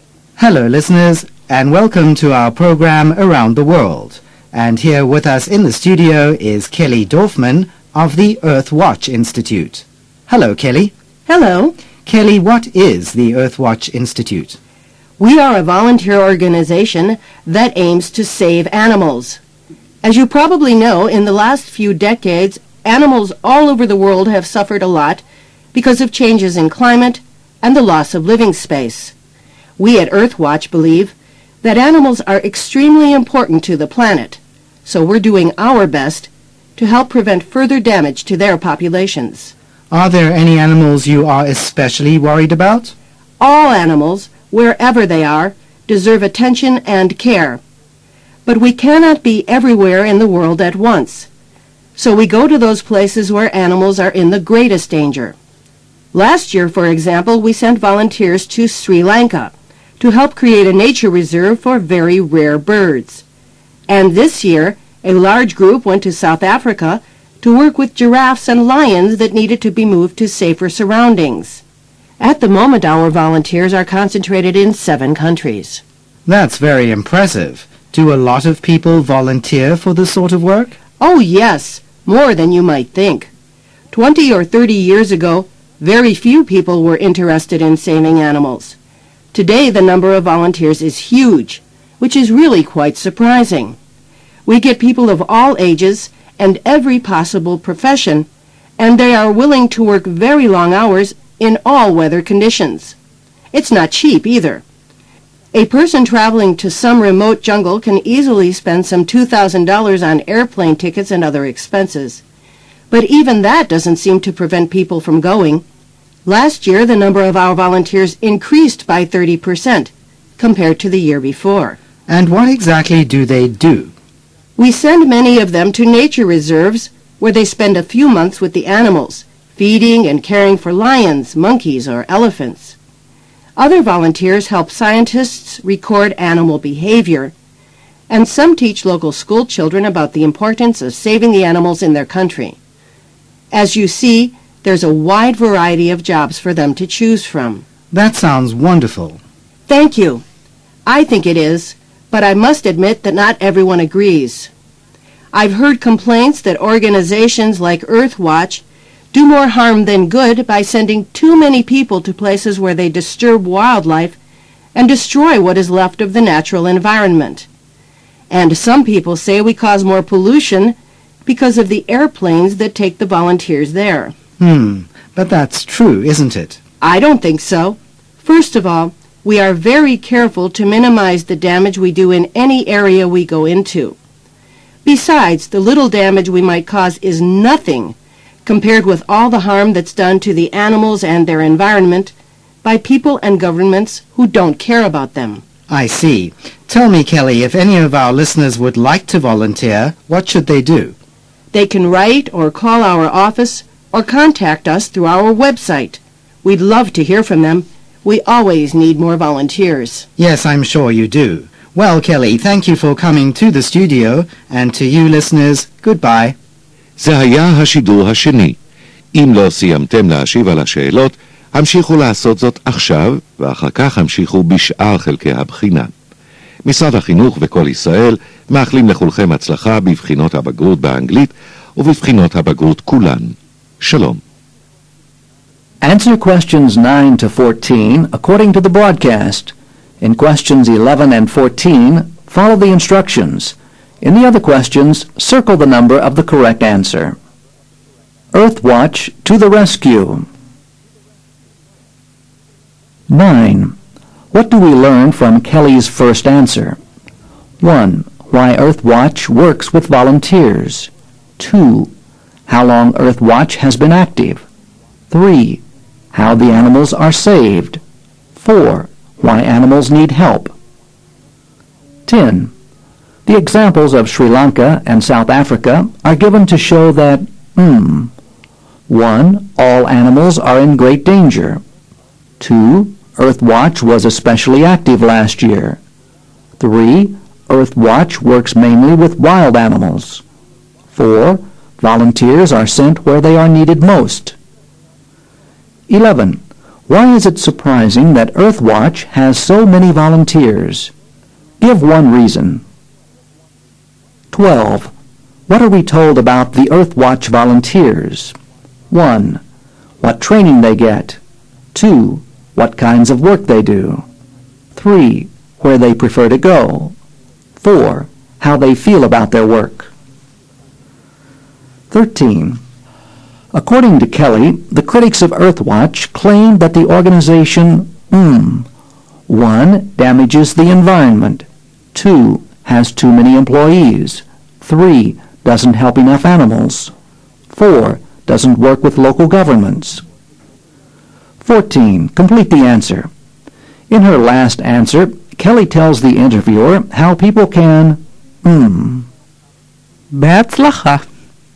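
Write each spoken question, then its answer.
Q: What do we learn from Kelly's first answer?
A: 4: Why animals need help.

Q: The examples of Sri Lanka and South Africa are given to show that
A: 4: Volunteers are sent where they are needed most.

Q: Why is it surprising that Earth Watch has so many volunteers?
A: It is expensive (about $2,000) and the work is hard, long hours in all weather

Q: What are we told about the Earth Watch volunteers?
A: 2: What kinds of work they do?

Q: According to Kelly, the critics of Earth Watch claim that the organization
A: 1: Damages the environment.

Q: Complete the answer. In her last answer, Kelly tells the interviewer how people can...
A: volunteer / contact Earth Watch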